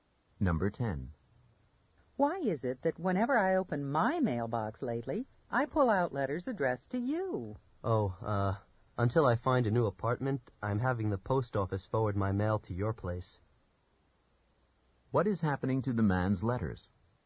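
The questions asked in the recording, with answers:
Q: What is happening to the man's letters?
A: They are being forwarded to the woman's place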